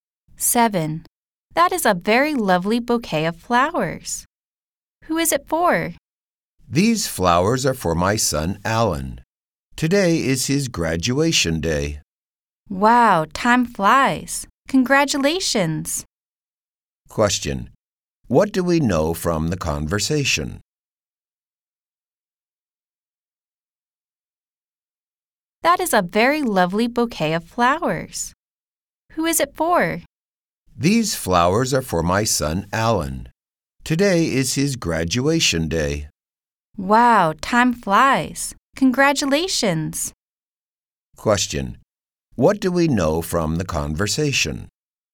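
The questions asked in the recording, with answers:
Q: What do we know from the conversation?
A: Today is Alan's graduation day.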